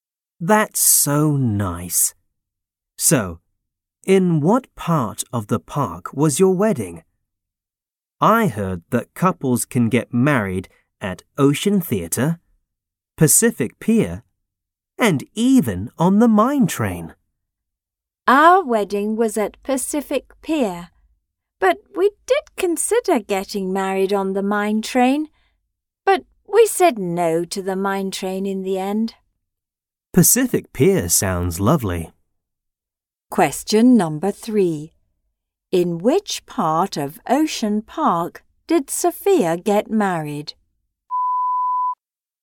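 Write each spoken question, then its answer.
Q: In which part of Ocean Park did Sophia get married?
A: Pacific Pier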